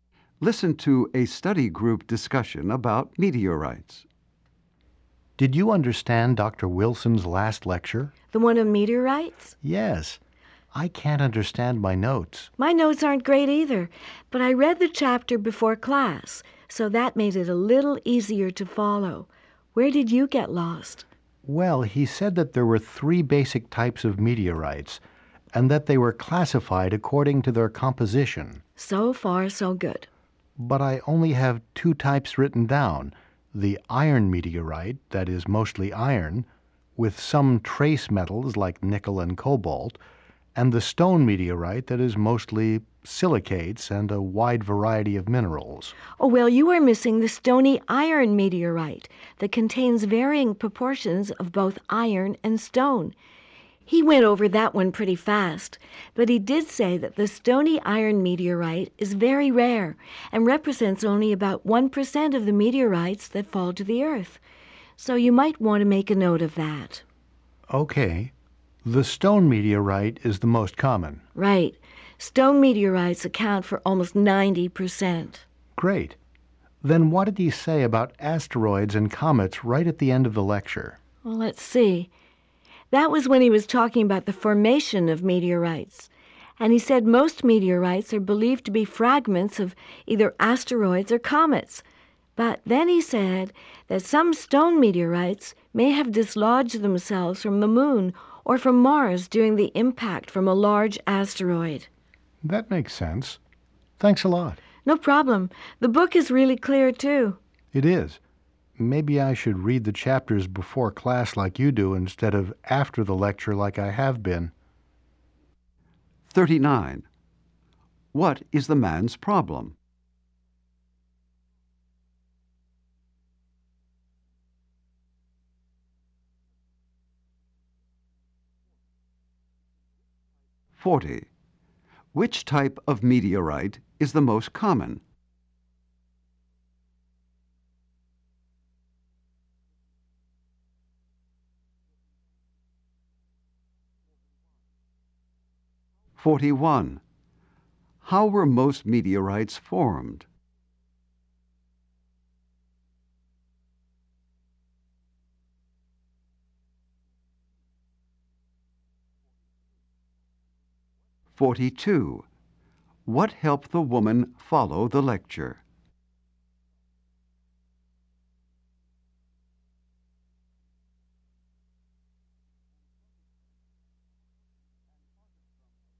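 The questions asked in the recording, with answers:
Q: What is the man's problem?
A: He can't understand his lecture notes

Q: Which type of meteorite is the most common?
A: The stone meteorite

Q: How were most meteorites formed?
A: As fragments of asteroids or comets

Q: What helped the woman follow the lecture?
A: She read the chapter before class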